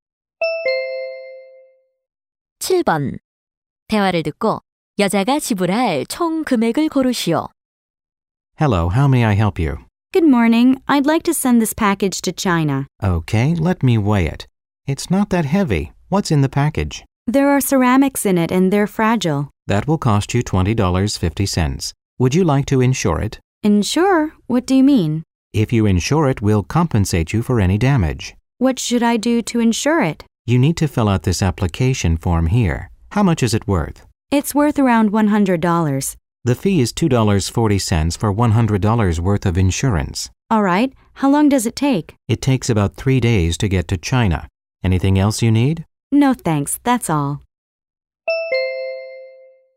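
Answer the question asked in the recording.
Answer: $22.90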